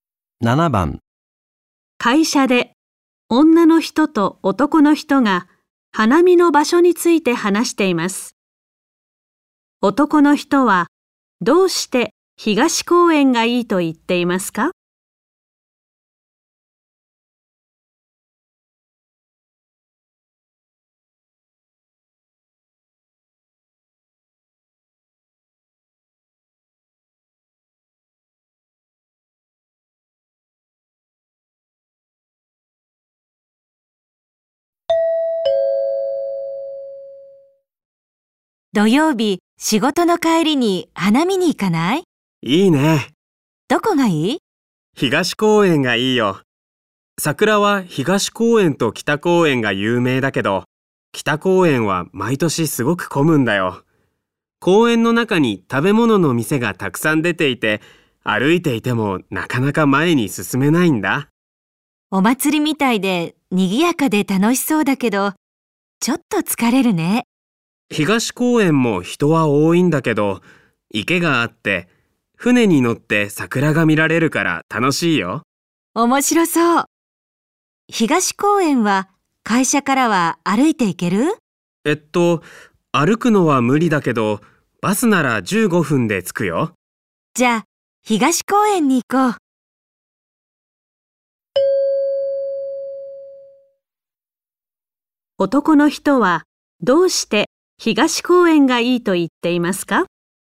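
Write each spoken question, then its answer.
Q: 男の人はどうして東公園がいいと言っていますか?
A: 池で船に乗って桜が見られるから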